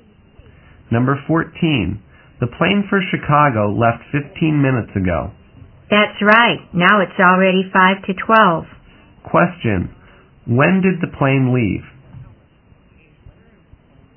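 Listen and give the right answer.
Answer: At 11:40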